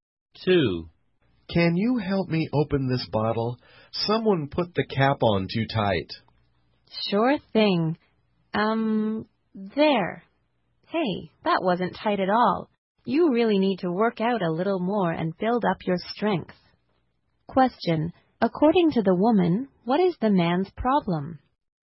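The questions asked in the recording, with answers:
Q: According to the woman, what is the man's problem?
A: He is not strong enough and needs to work out more.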